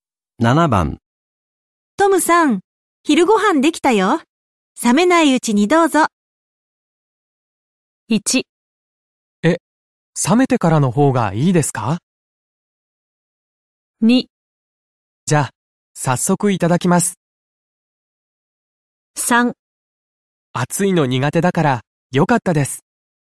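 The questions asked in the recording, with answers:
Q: トムさん、昼ご飯できたよ。冷めないうちにどうぞ。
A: 2: じゃあ、早速いただきます。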